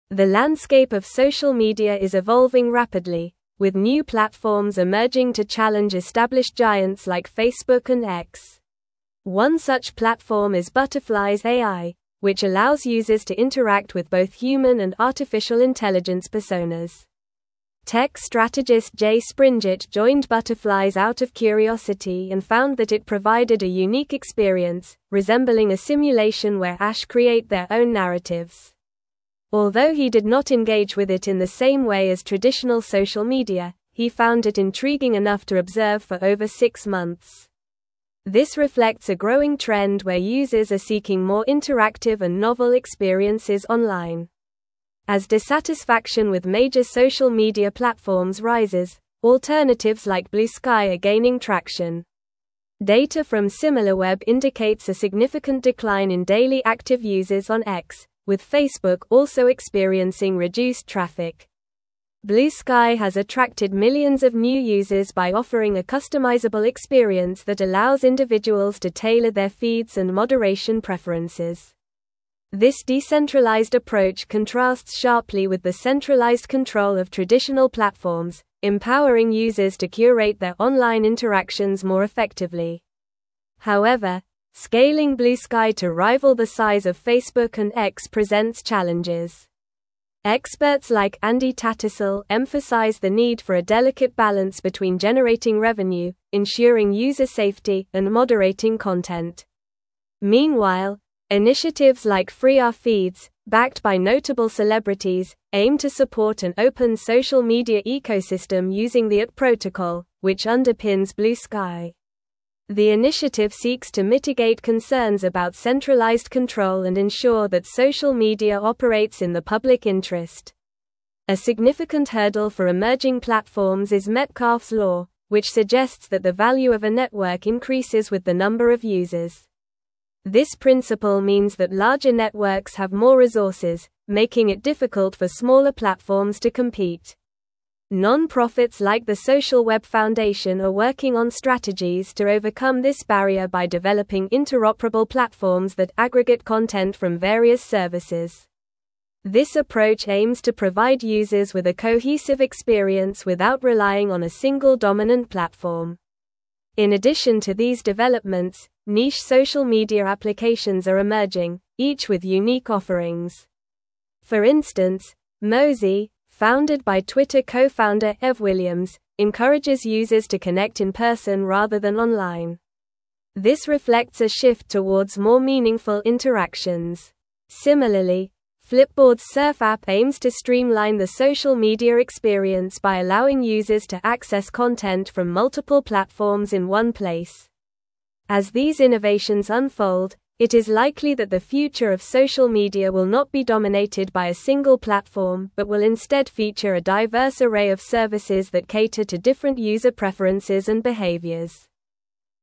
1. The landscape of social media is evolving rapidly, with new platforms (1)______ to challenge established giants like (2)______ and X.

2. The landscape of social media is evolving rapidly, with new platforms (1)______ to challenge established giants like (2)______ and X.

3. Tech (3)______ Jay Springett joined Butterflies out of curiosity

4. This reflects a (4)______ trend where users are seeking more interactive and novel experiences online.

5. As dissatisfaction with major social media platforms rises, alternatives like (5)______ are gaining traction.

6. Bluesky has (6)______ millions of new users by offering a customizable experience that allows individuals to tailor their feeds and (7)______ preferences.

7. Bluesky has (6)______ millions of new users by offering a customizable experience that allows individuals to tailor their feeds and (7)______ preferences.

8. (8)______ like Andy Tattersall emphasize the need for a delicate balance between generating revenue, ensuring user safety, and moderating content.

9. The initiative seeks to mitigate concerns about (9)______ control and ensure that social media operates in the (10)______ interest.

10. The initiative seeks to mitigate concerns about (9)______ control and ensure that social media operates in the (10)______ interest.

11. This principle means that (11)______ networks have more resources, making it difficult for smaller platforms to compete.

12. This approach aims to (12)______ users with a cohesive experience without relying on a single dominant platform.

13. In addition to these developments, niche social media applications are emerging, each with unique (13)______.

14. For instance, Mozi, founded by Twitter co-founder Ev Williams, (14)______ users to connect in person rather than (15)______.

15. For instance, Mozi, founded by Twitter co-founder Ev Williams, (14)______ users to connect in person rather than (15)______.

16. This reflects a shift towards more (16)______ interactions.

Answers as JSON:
{"1": "emerging", "2": "Facebook", "3": "strategist", "4": "growing", "5": "Bluesky", "6": "attracted", "7": "moderation", "8": "Experts", "9": "centralized", "10": "public", "11": "larger", "12": "provide", "13": "offerings", "14": "encourages", "15": "online", "16": "meaningful"}

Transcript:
The landscape of social media is evolving rapidly, with new platforms emerging to challenge established giants like Facebook and X. One such platform is Butterflies AI, which allows users to interact with both human and artificial intelligence personas. Tech strategist Jay Springett joined Butterflies out of curiosity and found that it provided a unique experience, resembling a simulation where AIs create their own narratives. Although he did not engage with it in the same way as traditional social media, he found it intriguing enough to observe for over six months. This reflects a growing trend where users are seeking more interactive and novel experiences online.
As dissatisfaction with major social media platforms rises, alternatives like Bluesky are gaining traction. Data from Similarweb indicates a significant decline in daily active users on X, with Facebook also experiencing reduced traffic. Bluesky has attracted millions of new users by offering a customizable experience that allows individuals to tailor their feeds and moderation preferences. This decentralized approach contrasts sharply with the centralized control of traditional platforms, empowering users to curate their online interactions more effectively.
However, scaling Bluesky to rival the size of Facebook and X presents challenges. Experts like Andy Tattersall emphasize the need for a delicate balance between generating revenue, ensuring user safety, and moderating content. Meanwhile, initiatives like Free Our Feeds, backed by notable celebrities, aim to support an open social media ecosystem using the AT Protocol, which underpins Bluesky. The initiative seeks to mitigate concerns about centralized control and ensure that social media operates in the public interest.
A significant hurdle for emerging platforms is Metcalfe's Law, which suggests that the value of a network increases with the number of users. This principle means that larger networks have more resources, making it difficult for smaller platforms to compete. Non-profits like the Social Web Foundation are working on strategies to overcome this barrier by developing interoperable platforms that aggregate content from various services. This approach aims to provide users with a cohesive experience without relying on a single dominant platform.
In addition to these developments, niche social media applications are emerging, each with unique offerings. For instance, Mozi, founded by Twitter co-founder Ev Williams, encourages users to connect in person rather than online. This reflects a shift towards more meaningful interactions. Similarly, Flipboard's Surf app aims to streamline the social media experience by allowing users to access content from multiple platforms in one place. As these innovations unfold, it is likely that the future of social media will not be dominated by a single platform but will instead feature a diverse array of services that cater to different user preferences and behaviors.

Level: Level 4